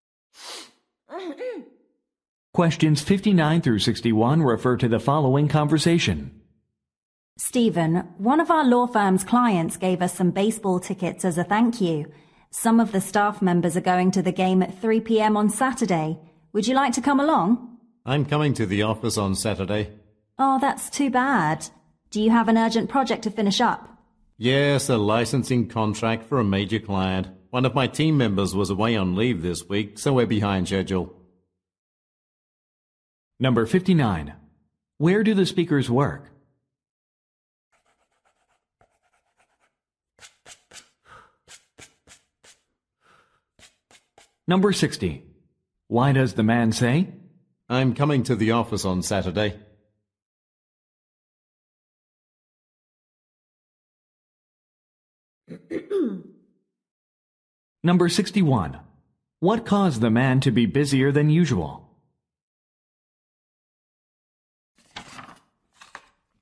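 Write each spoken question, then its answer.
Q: Where do the speakers work?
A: At a law firm

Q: Why does the man say?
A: He cannot go to the game

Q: What caused the man to be busier than usual?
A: A team member was on leave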